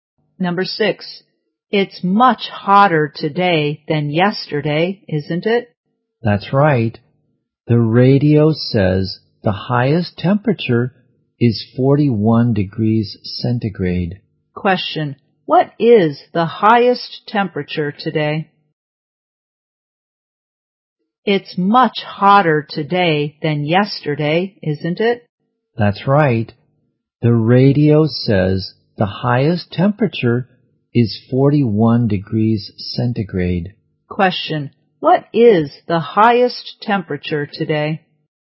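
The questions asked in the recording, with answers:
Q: what is the highest temperature today?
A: 41 degrees centigrade.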